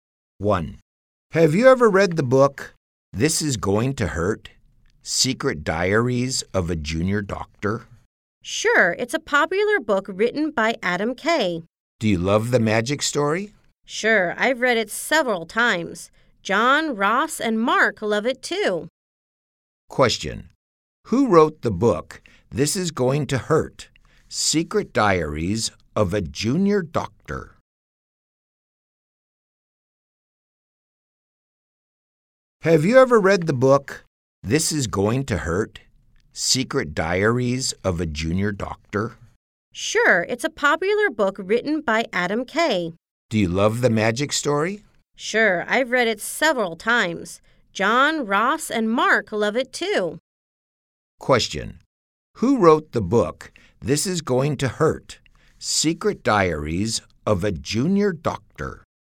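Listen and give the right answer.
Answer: Adam Kay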